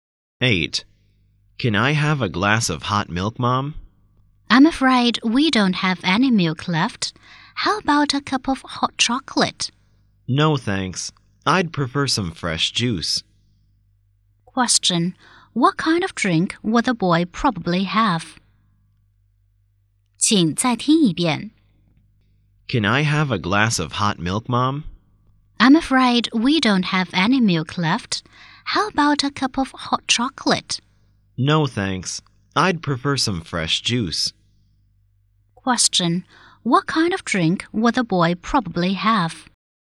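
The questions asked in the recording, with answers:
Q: Question. What kind of drink would the boy probably have?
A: Fresh juice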